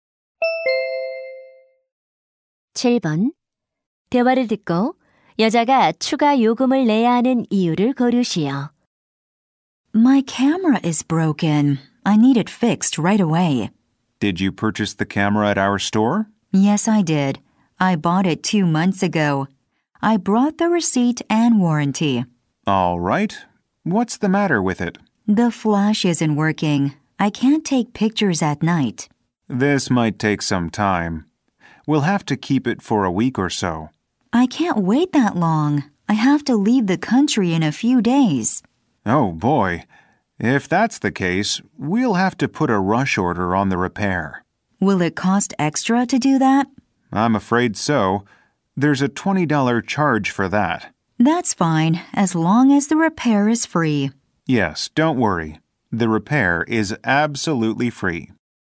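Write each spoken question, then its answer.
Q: 대화를 듣고 여자가 추가 요금을 내야 하는 이유를 고르시오.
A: 카메라 수리를 빨리 받아야 해서(긴급 수리)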